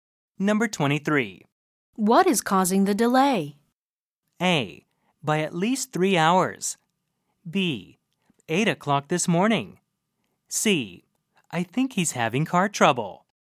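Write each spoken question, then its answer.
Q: What is causing the delay?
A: C: I think he's having car trouble.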